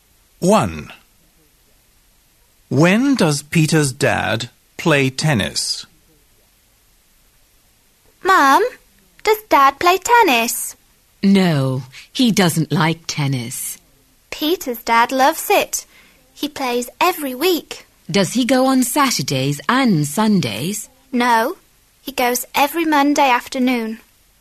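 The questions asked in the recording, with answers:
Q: When does Peter's dad play tennis?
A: Every Monday afternoon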